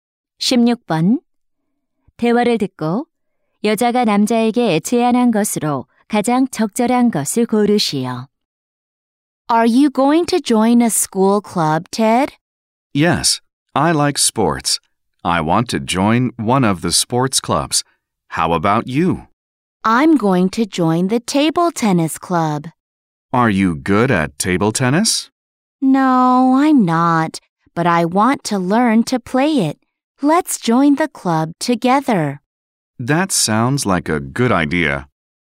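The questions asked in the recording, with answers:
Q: 대화를 듣고 여자가 남자에게 제안한 것으로 가장 적절한 것을 고르시오.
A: 탁구 동아리에 함께 가입하기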